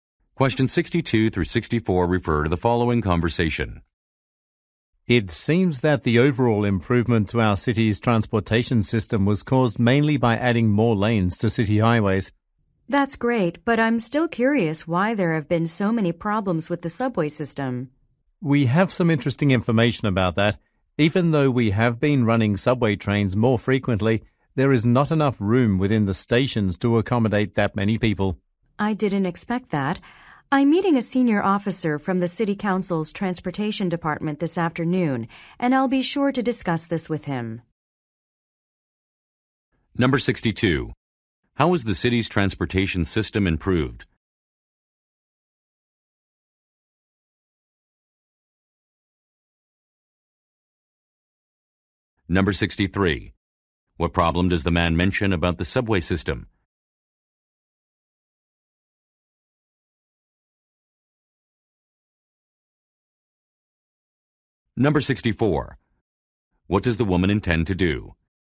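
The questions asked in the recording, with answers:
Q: How is the city's transportation system improved?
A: By adding more lanes to city highways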